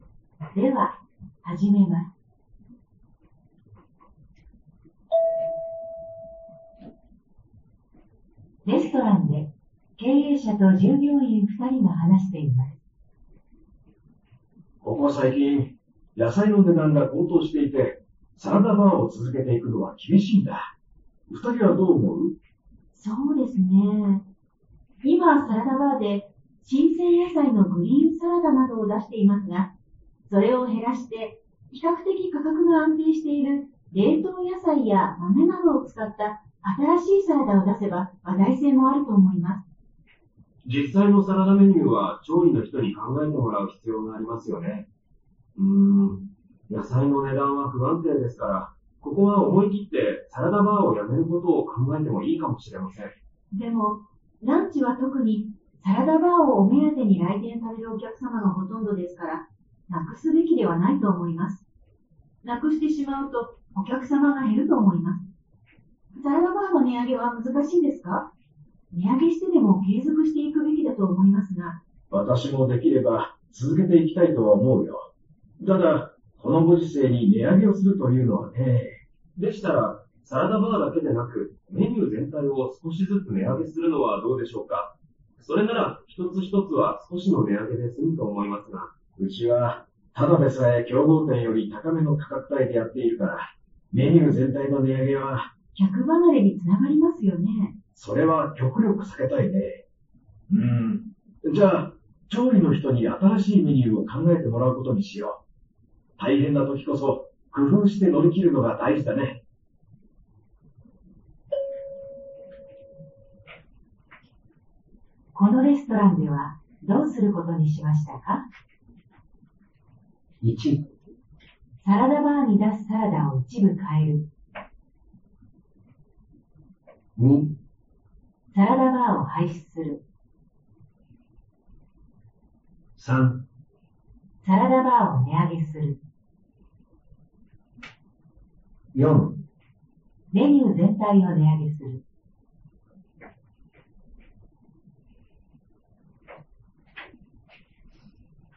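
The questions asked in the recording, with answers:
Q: このレストランでは、どうすることにしましたか?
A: 1: サラダバーに出すサラダを一部変える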